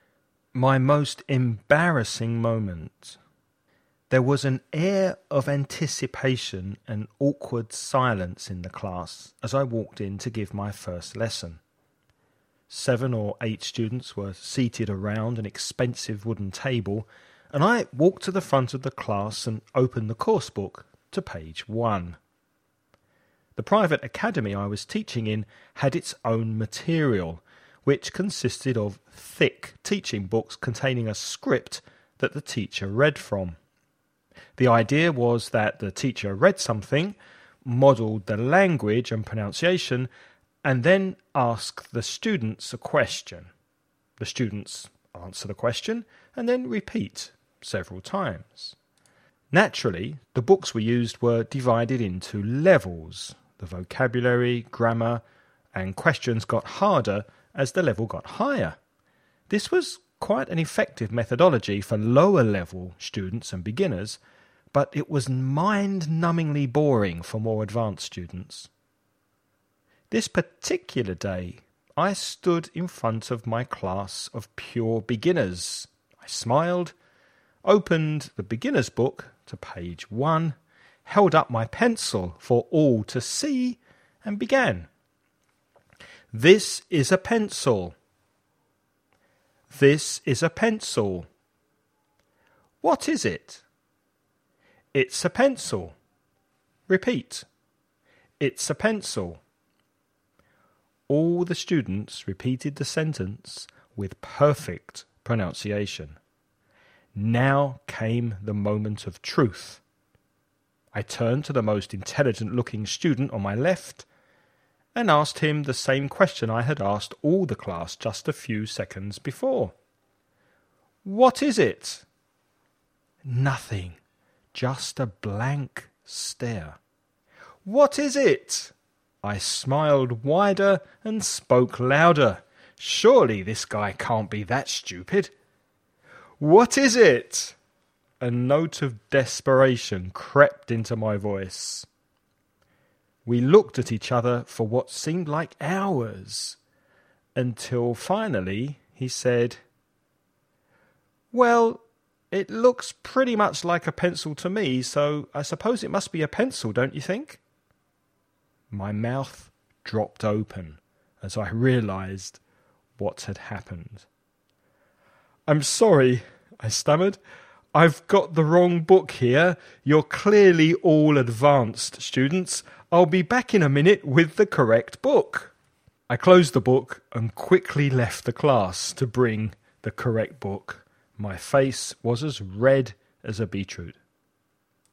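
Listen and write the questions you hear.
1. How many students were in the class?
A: 7 or 8

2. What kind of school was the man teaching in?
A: A private academy

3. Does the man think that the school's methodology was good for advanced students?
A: No, it was mind-numbingly boring for them

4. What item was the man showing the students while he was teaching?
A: A pencil

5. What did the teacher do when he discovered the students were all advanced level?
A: He apologised, closed the book and left to get the correct book

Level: nivel avanzado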